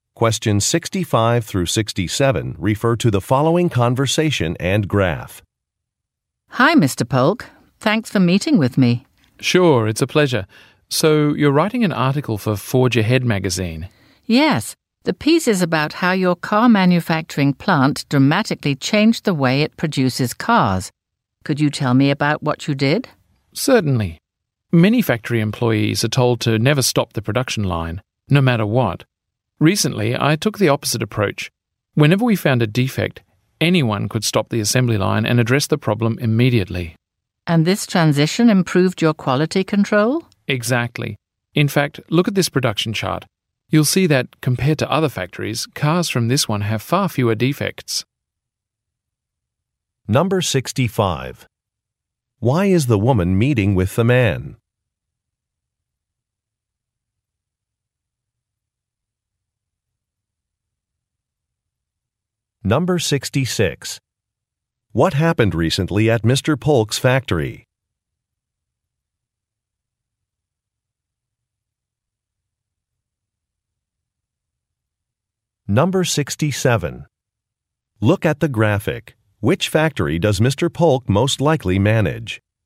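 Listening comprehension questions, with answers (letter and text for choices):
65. Why is the woman meeting with the man?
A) To select conference participants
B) To finalize an agreement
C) To research a news article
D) To purchase an automobile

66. What happened recently at Mr. Polk's factory?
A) Better equipment was installed.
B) Additional employees were hired.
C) An office was renovated.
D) A production process was improved.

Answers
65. C) To research a news article
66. D) A production process was improved.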